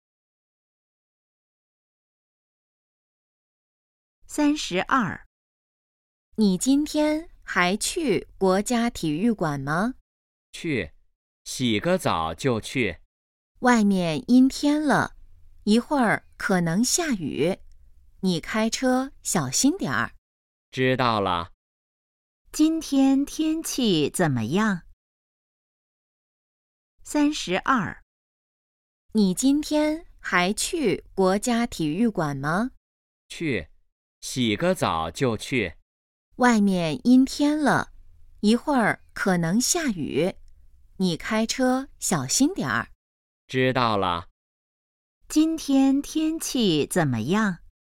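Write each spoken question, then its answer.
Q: 今天天气怎么样?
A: 阴天,可能下雨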